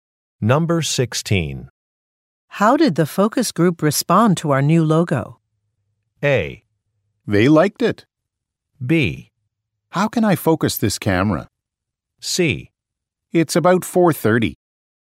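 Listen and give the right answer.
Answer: A: They liked it.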